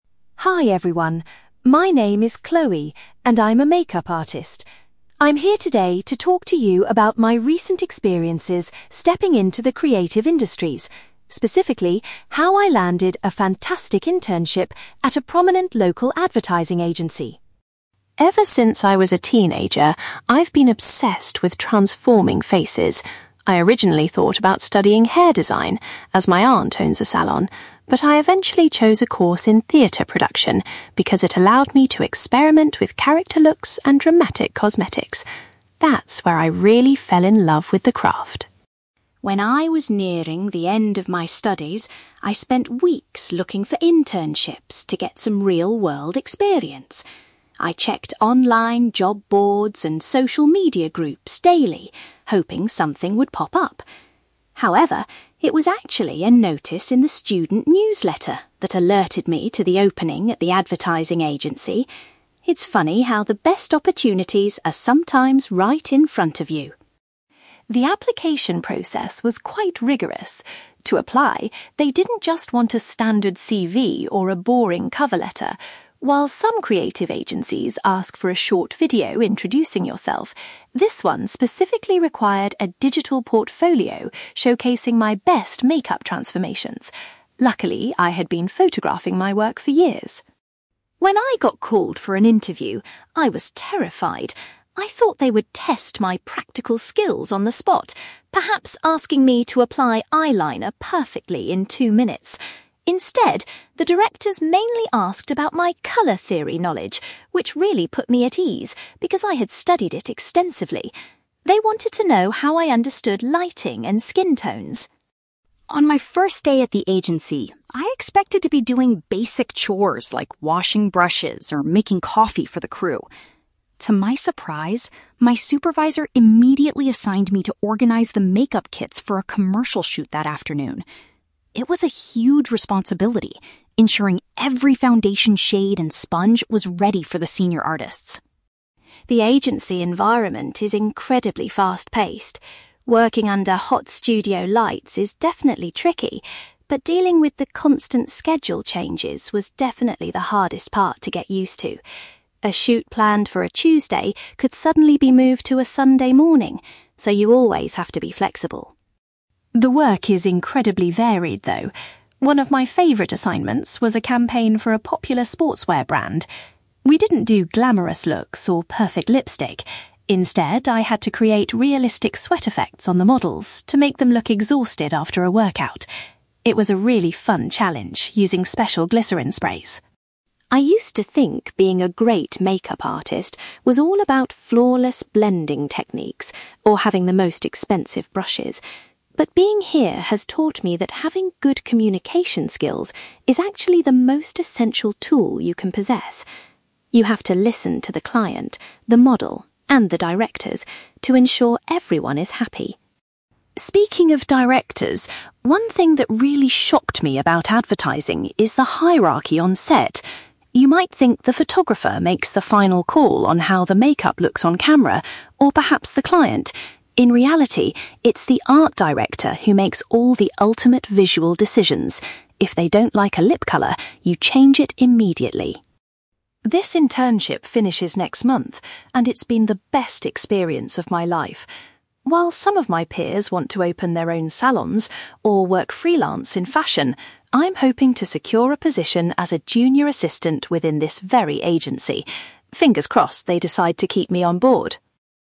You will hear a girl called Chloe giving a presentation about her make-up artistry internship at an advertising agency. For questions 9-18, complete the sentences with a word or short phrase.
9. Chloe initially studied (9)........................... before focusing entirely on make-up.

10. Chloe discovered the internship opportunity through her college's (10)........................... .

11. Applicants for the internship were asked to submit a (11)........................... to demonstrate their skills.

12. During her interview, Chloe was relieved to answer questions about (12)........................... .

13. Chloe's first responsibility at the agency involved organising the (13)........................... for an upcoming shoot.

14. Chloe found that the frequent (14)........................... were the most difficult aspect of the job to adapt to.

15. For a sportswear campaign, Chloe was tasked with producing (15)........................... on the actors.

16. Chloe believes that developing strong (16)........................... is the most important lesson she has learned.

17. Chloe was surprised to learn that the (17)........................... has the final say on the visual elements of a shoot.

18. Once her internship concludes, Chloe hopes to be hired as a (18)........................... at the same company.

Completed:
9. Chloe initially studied theatre production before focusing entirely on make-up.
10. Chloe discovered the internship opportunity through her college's student newsletter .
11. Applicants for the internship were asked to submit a digital portfolio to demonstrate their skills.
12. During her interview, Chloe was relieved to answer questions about colour theory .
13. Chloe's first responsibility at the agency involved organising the make-up kits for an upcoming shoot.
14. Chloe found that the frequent schedule changes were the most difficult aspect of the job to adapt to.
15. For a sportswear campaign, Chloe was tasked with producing sweat effects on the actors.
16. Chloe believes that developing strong communication skills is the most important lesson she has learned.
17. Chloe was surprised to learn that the art director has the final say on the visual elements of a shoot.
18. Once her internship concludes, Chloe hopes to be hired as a junior assistant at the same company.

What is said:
Chloe: Hi everyone. My name is Chloe, and I'm a make-up artist. I'm here today to talk to you about my recent experiences stepping into the creative industries, specifically how I landed a fantastic internship at a prominent local advertising agency.
Ever since I was a teenager, I've been obsessed with transforming faces. I originally thought about studying hair design, as my aunt owns a salon, but I eventually chose a course in theatre production because it allowed me to experiment with character looks and dramatic cosmetics. That's where I really fell in love with the craft.
When I was nearing the end of my studies, I spent weeks looking for internships to get some real-world experience. I checked online job boards and social media groups daily, hoping something would pop up. However, it was actually a notice in the student newsletter that alerted me to the opening at the advertising agency. It's funny how the best opportunities are sometimes right in front of you.
The application process was quite rigorous. To apply, they didn't just want a standard CV or a boring cover letter. While some creative agencies ask for a short video introducing yourself, this one specifically required a digital portfolio showcasing my best make-up transformations. Luckily, I had been photographing my work for years.
When I got called for an interview, I was terrified. I thought they would test my practical skills on the spot, perhaps asking me to apply eyeliner perfectly in two minutes! Instead, the directors mainly asked about my colour theory knowledge, which really put me at ease because I had studied it extensively. They wanted to know how I understood lighting and skin tones.
On my first day at the agency, I expected to be doing basic chores like washing brushes or making coffee for the crew. To my surprise, my supervisor immediately assigned me to organise the make-up kits for a commercial shoot that afternoon. It was a huge responsibility ensuring every foundation shade and sponge was ready for the senior artists.
The agency environment is incredibly fast-paced. Working under hot studio lights is definitely tricky, but dealing with the constant schedule changes was definitely the hardest part to get used to. A shoot planned for a Tuesday could suddenly be moved to a Sunday morning, so you always have to be flexible.
The work is incredibly varied, though. One of my favourite assignments was a campaign for a popular sportswear brand. We didn't do glamourous looks or perfect lipstick; instead, I had to create realistic sweat effects on the models to make them look exhausted after a workout. It was a really fun challenge using special glycerine sprays.
I used to think being a great make-up artist was all about flawless blending techniques or having the most expensive brushes. But being here has taught me that having good communication skills is actually the most essential tool you can possess. You have to listen to the client, the model, and the directors to ensure everyone is happy.
Speaking of directors, one thing that really shocked me about advertising is the hierarchy on set. You might think the photographer makes the final call on how the make-up looks on camera, or perhaps the client. In reality, it's the art director who makes all the ultimate visual decisions. If they don't like a lip colour, you change it immediately.
This internship finishes next month, and it's been the best experience of my life. While some of my peers want to open their own salons, or work freelance in fashion, I'm hoping to secure a position as a junior assistant within this very agency. Fingers crossed they decide to keep me on board!

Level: B2